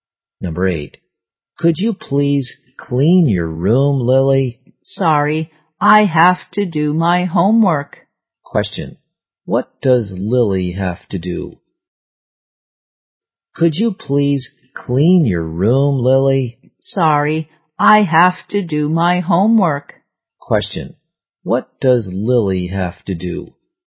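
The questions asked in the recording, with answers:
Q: What does Lily have to do?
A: Do her homework.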